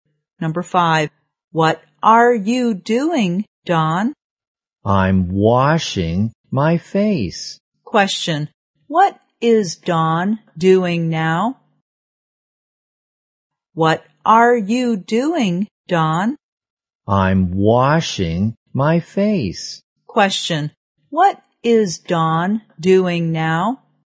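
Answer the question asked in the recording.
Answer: Washing his face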